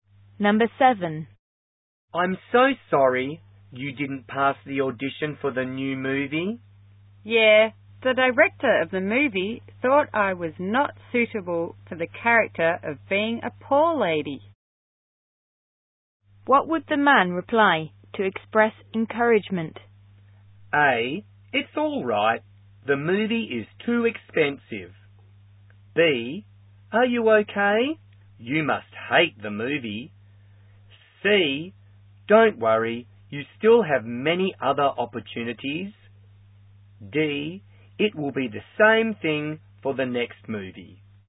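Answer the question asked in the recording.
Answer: C: Don't worry, you still have many other opportunities.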